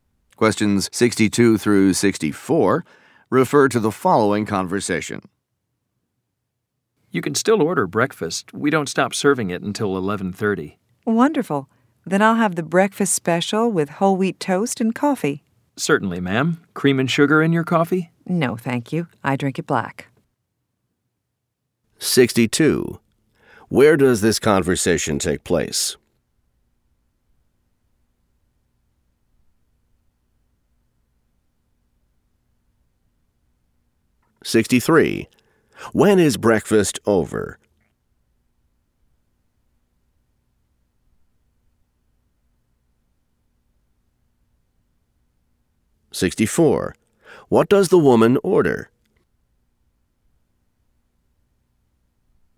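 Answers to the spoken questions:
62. In a restaurant
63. 11:30
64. The breakfast special with whole wheat toast and black coffee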